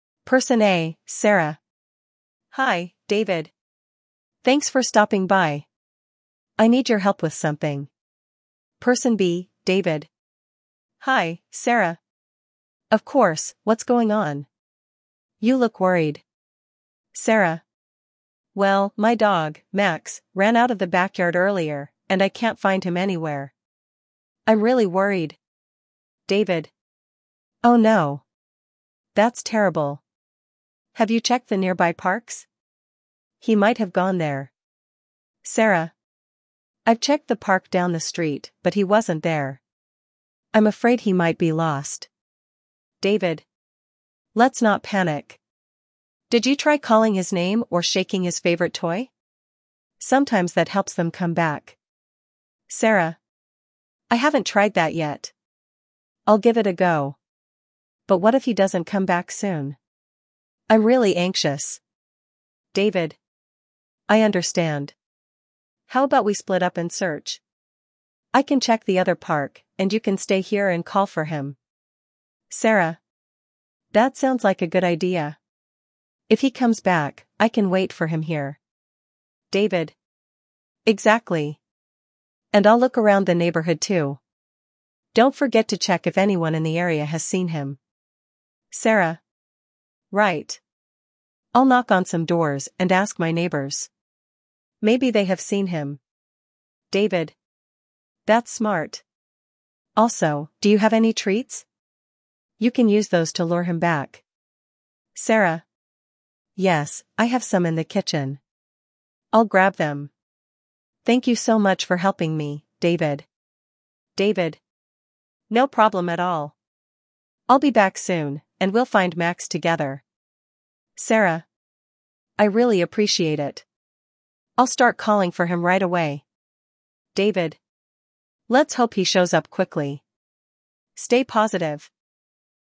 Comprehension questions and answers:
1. What issue is Sarah facing?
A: Her dog is lost.

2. Where did Sarah last see her dog?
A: In the backyard

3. What does David suggest Sarah do to find her dog?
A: Call his name and shake a toy

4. What plan do Sarah and David come up with?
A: To split up and search for Max

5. What does Sarah plan to do while David searches?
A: Knock on neighbors' doors

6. What does David suggest using to lure Max back?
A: Treats

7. How does Sarah feel about the situation at the beginning?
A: Anxious

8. What does David say to encourage Sarah?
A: To stay positive

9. How does Sarah react to David's help?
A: She appreciates it

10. What is the overall theme of the conversation?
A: Helping a neighbor find her lost dog

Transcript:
[Person A: Sarah]
Hi, David! Thanks for stopping by. I need your help with something.
[Person B: David]
Hi, Sarah! Of course, what's going on? You look worried.
[Sarah]
Well, my dog, Max, ran out of the backyard earlier, and I can't find him anywhere. I'm really worried!
[David]
Oh no! That's terrible. Have you checked the nearby parks? He might have gone there.
[Sarah]
I've checked the park down the street, but he wasn't there. I'm afraid he might be lost.
[David]
Let's not panic. Did you try calling his name or shaking his favorite toy? Sometimes that helps them come back.
[Sarah]
I haven't tried that yet! I'll give it a go. But what if he doesn't come back soon? I'm really anxious.
[David]
I understand. How about we split up and search? I can check the other park, and you can stay here and call for him.
[Sarah]
That sounds like a good idea. If he comes back, I can wait for him here.
[David]
Exactly! And I'll look around the neighborhood too. Don't forget to check if anyone in the area has seen him.
[Sarah]
Right! I'll knock on some doors and ask my neighbors. Maybe they have seen him.
[David]
That's smart! Also, do you have any treats? You can use those to lure him back.
[Sarah]
Yes, I have some in the kitchen. I'll grab them. Thank you so much for helping me, David.
[David]
No problem at all! I'll be back soon, and we'll find Max together.
[Sarah]
I really appreciate it. I'll start calling for him right away!
[David]
Let's hope he shows up quickly. Stay positive!